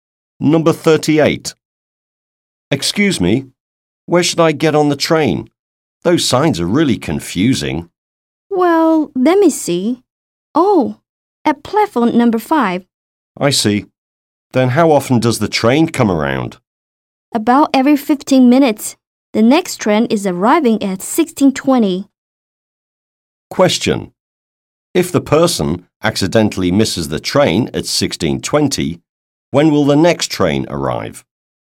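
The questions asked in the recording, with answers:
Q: If the person accidentally misses the train at 16:20, when will the next train arrive?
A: At 16:35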